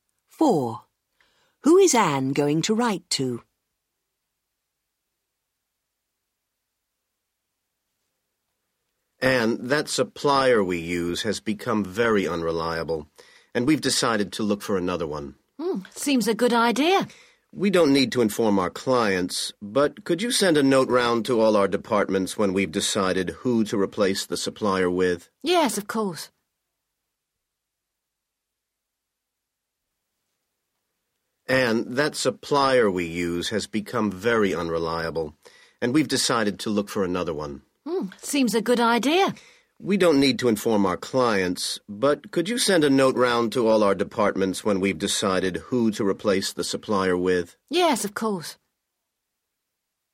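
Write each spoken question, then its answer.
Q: Who is Anne going to write to?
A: all the departments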